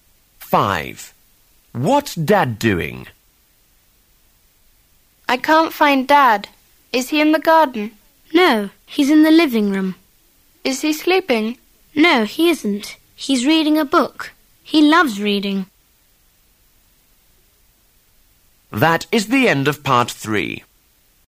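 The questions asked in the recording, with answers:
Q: What's Dad doing?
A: Reading a book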